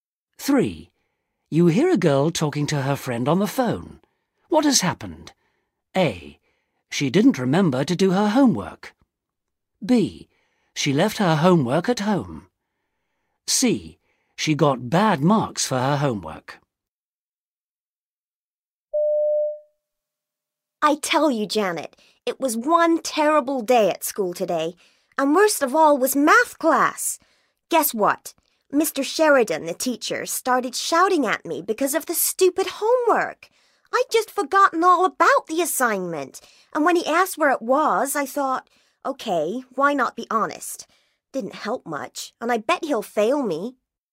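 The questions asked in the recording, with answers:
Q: What has happened?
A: A: She didn't remember to do her homework.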